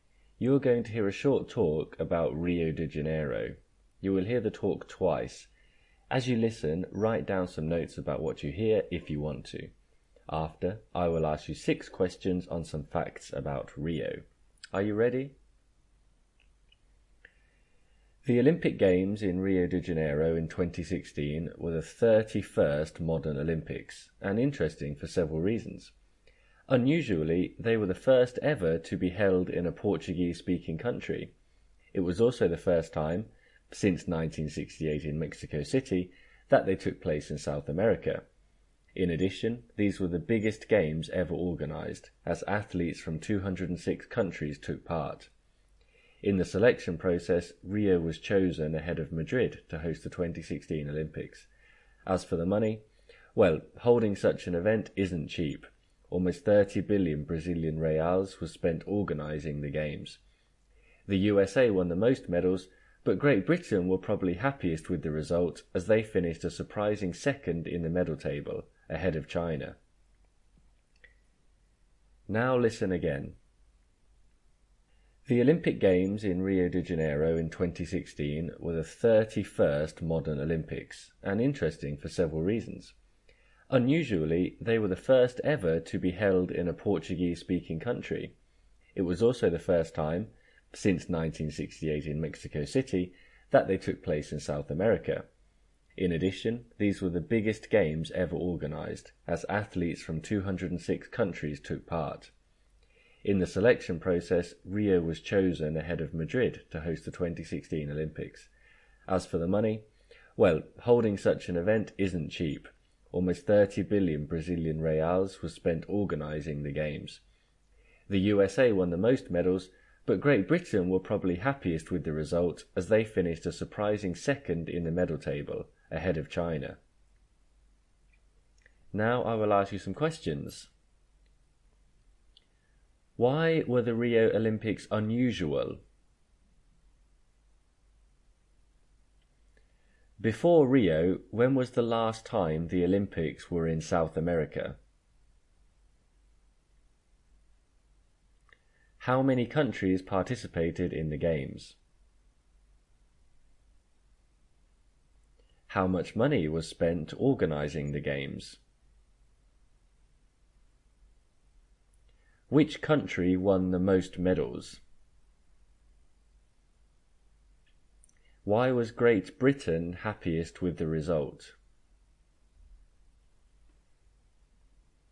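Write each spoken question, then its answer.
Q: Why were the Rio Olympics unusual?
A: They were the first held in a Portuguese-speaking country

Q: Before Rio, when was the last time the Olympics were in South America?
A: 1968 in Mexico City

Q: How many countries participated in the Games?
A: 206

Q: How much money was spent organizing the Games?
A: Almost 30 billion Brazilian reals

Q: Which country won the most medals?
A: The USA

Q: Why was Great Britain happiest with the result?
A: They finished a surprising second in the medal table, ahead of China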